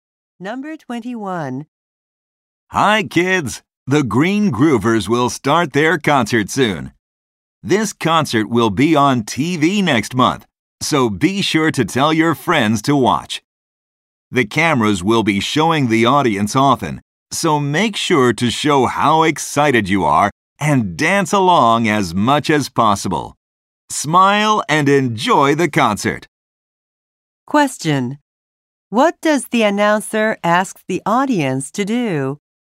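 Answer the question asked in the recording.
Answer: Show excitement and dance along.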